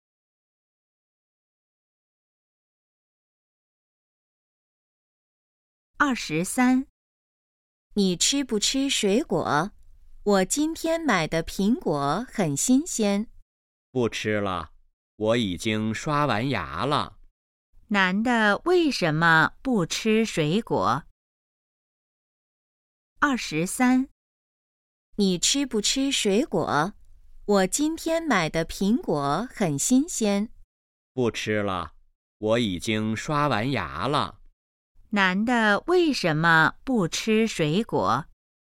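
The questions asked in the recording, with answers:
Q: 男的为什么不吃水果?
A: 已经刷完牙了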